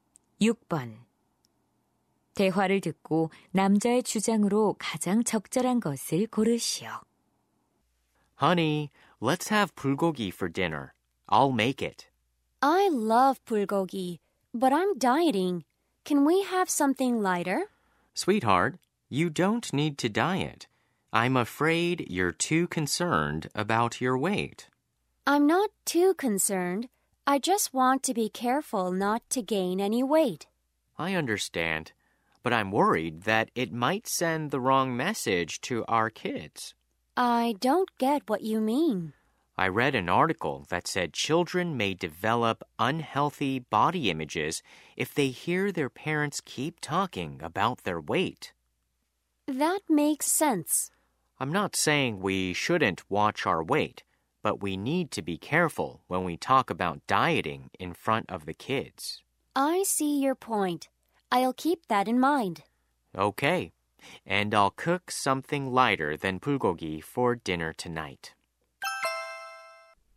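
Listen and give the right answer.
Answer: 아이들 앞에서 다이어트 이야기를 조심해야 한다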